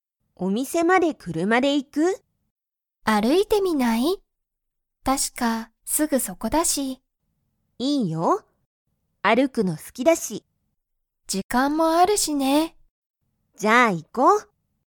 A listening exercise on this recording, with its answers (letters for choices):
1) エリとマキは、お店(みせ)まで車(くるま)で行(い)きますか?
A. はい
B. いいえ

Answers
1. B

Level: Level 1